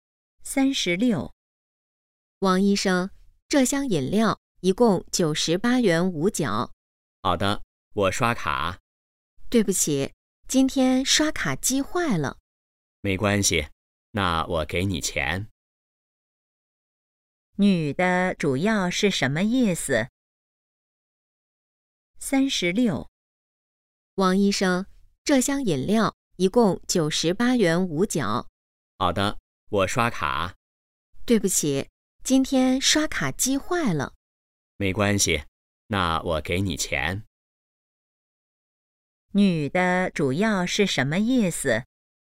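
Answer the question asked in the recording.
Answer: 刷卡机坏了,不能刷卡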